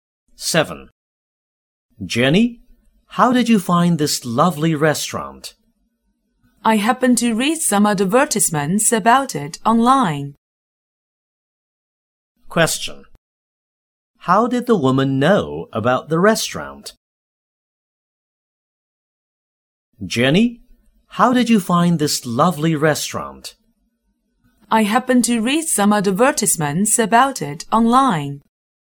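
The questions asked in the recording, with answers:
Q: How did the woman know about the restaurant?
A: From online advertisements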